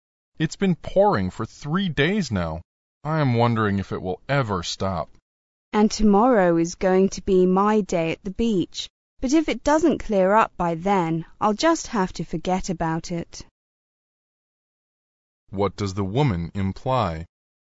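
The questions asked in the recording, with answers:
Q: What does the woman imply?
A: She may have to give up her day at the beach if the rain doesn't stop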